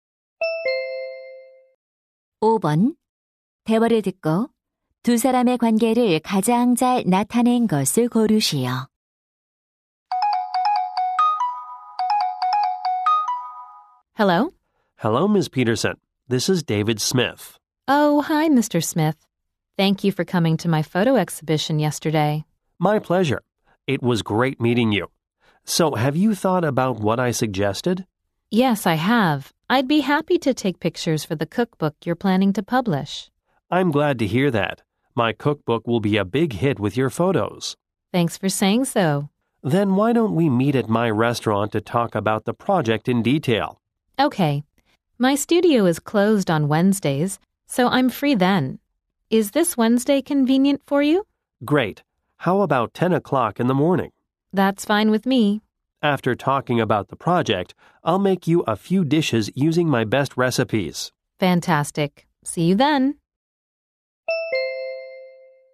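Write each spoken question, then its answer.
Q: 대화를 듣고 두 사람의 관계를 가장 잘 나타낸 것을 고르시오.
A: 요리책 저자(식당 요리사) — 사진작가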